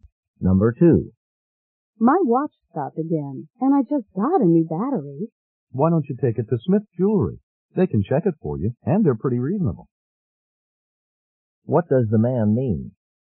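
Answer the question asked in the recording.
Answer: She should take the watch to Smith Jewelry to have it checked.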